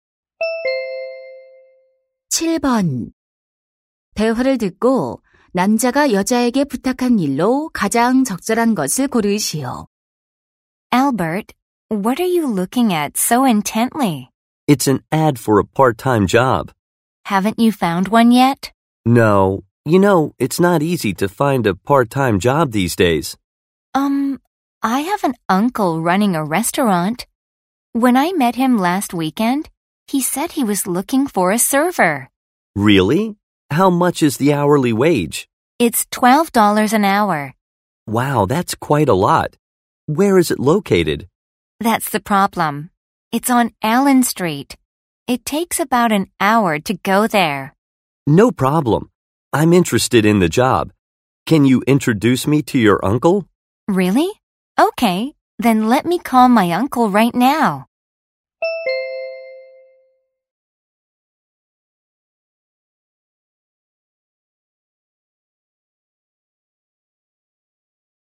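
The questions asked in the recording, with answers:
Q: 대화를 듣고 남자가 여자에게 부탁한 일로 가장 적절한 것을 고르시오.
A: 삼촌에게 소개해 주기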